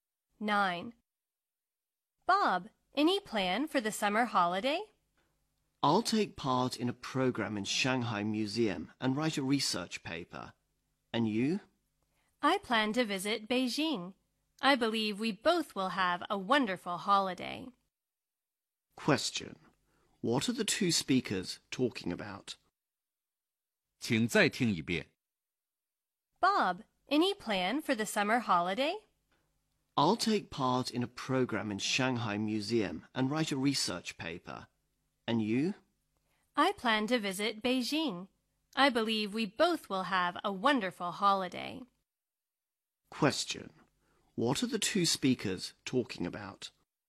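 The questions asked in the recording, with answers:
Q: What are the two speakers talking about?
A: Their plans for the summer holiday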